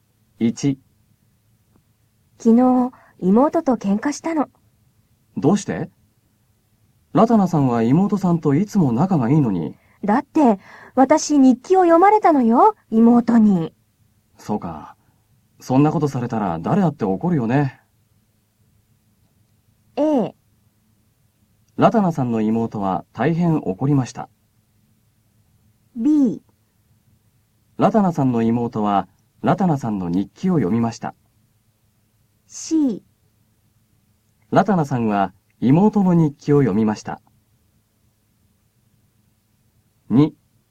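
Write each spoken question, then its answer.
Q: ラタナさんの妹はラタナさんの日記を読みました。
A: B: ラタナさんの妹はラタナさんの日記を読みました。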